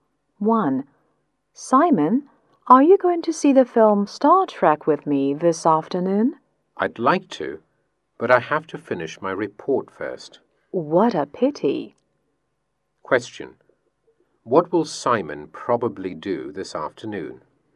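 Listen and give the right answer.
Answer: Finish his report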